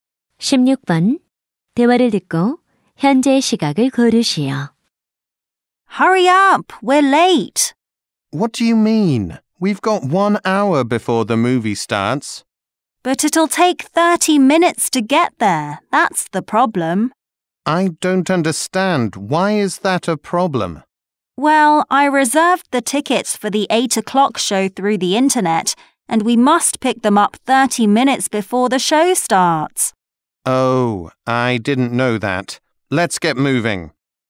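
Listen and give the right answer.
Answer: 7시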